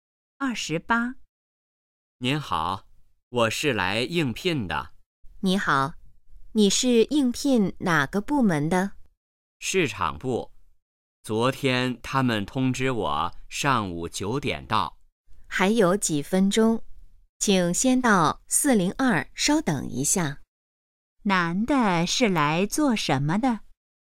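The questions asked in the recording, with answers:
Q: 男的是来做什么的?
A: 应聘(市场部)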